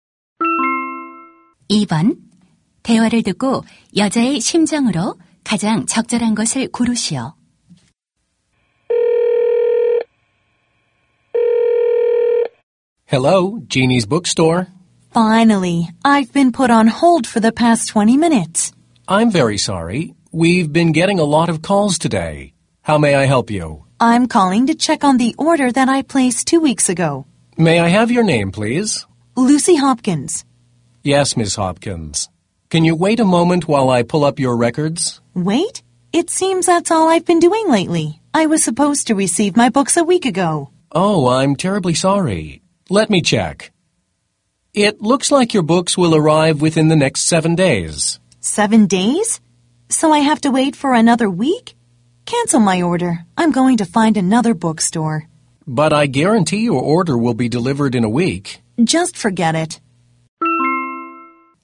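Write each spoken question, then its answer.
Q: 대화를 듣고 여자의 심정으로 가장 적절한 것을 고르시오.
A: 짜증나고 화남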